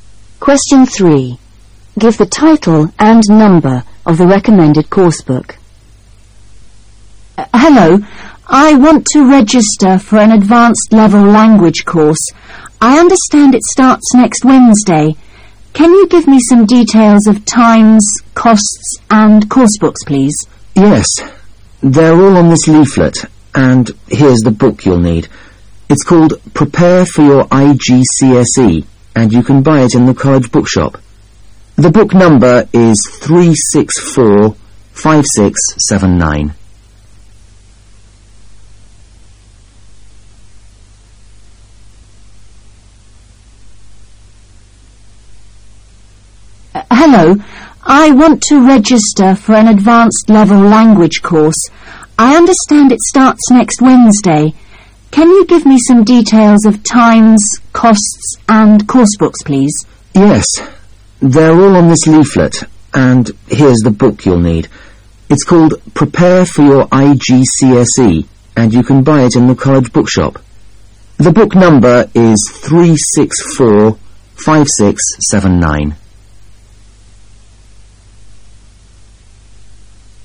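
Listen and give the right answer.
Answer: Prepare for Your IGCSE, 364-5679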